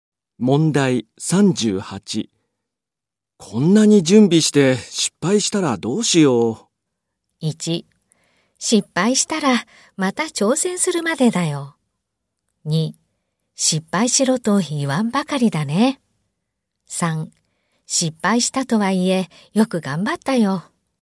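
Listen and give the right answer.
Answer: 1: 失敗したらまた挑戦するまでだよ。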